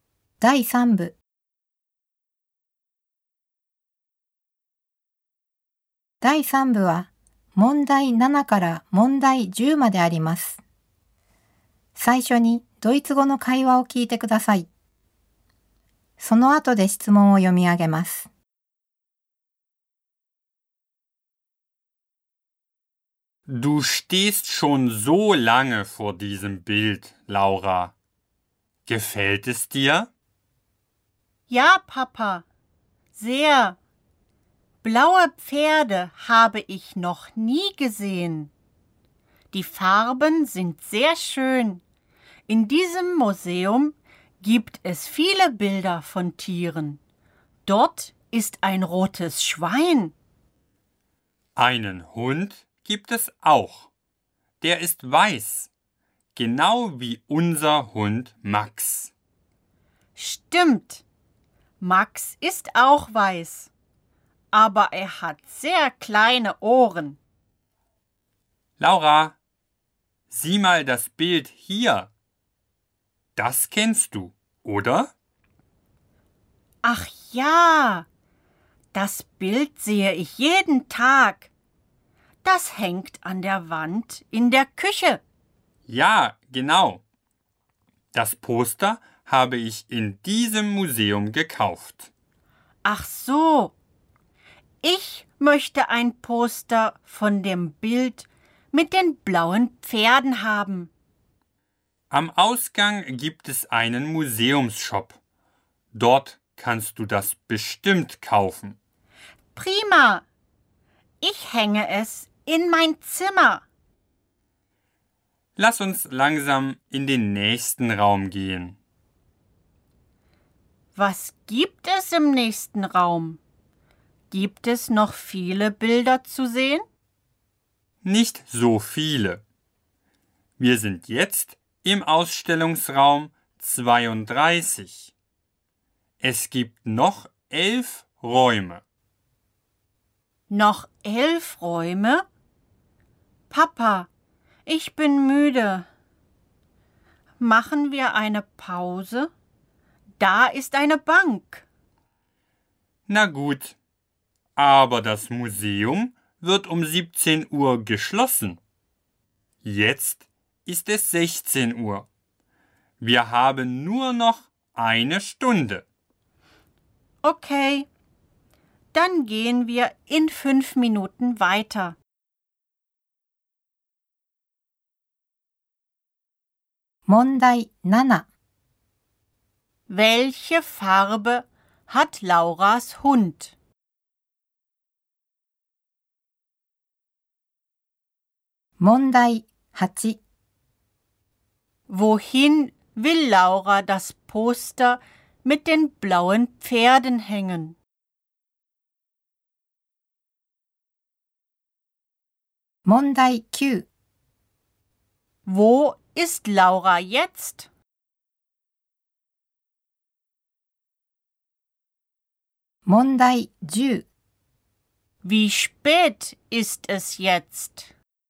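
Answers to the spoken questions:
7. Weiß
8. In ihr Zimmer
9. Im Museum, im Ausstellungsraum 32
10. 16 Uhr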